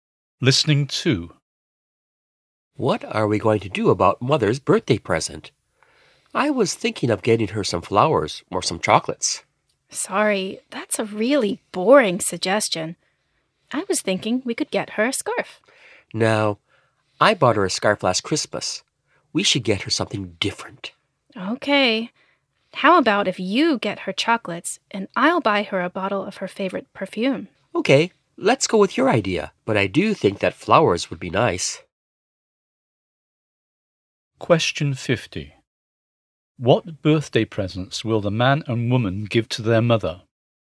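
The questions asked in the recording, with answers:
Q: What birthday presents will the man and woman give to their mother?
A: Chocolates and a bottle of perfume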